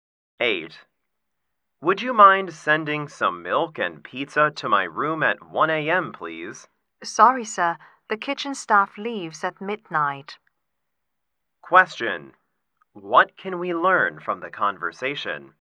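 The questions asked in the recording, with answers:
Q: What can we learn from the conversation?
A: Food can't be delivered because the kitchen staff leave at midnight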